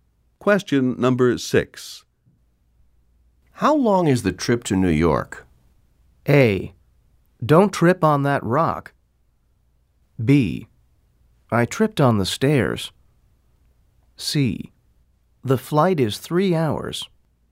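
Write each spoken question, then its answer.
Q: How long is the trip to New York?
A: C: The flight is 3 hours.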